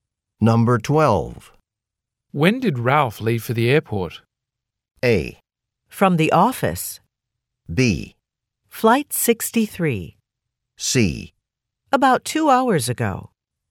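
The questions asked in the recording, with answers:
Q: When did Ralph leave for the airport?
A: C: About 2 hours ago.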